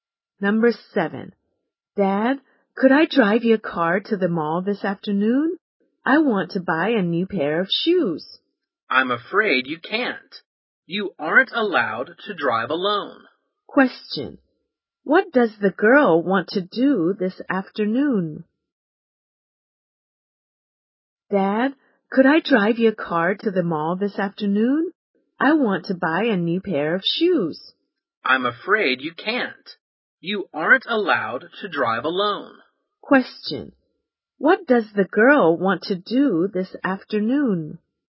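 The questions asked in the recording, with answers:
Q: What does the girl want to do this afternoon?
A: Buy a new pair of shoes at the mall.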